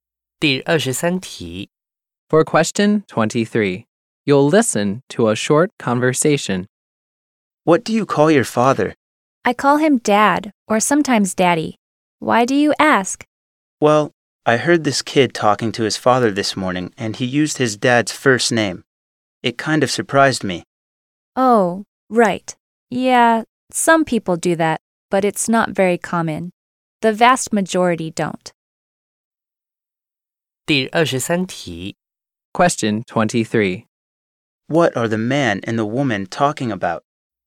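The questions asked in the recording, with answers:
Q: What are the man and the woman talking about?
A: What people call their fathers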